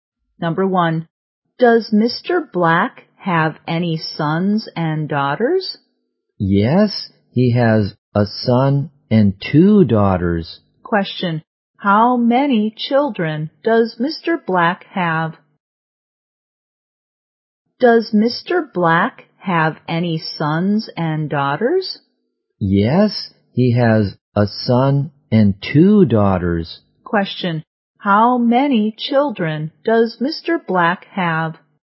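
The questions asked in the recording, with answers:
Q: how many children does Mr. Black have?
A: Three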